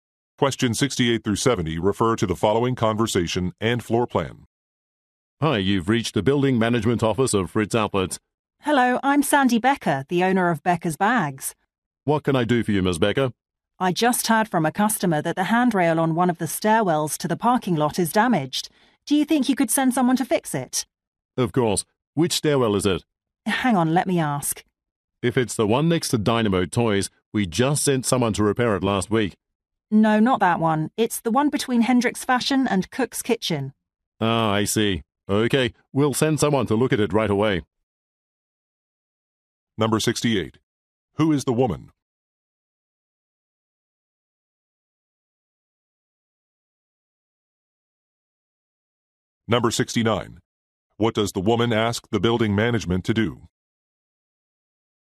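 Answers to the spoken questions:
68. A store owner (Becker's Bags)
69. Fix a damaged handrail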